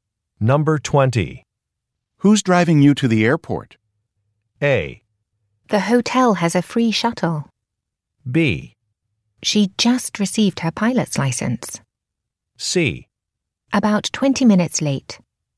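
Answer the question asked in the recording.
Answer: A: The hotel has a free shuttle.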